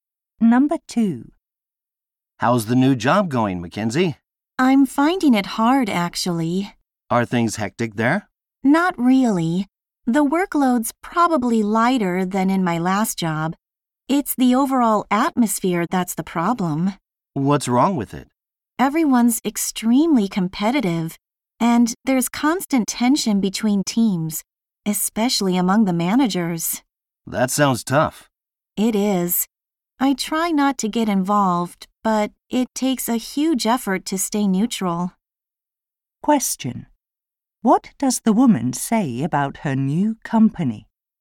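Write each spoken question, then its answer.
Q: What does the woman say about her new company?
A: The atmosphere is competitive and tense between teams.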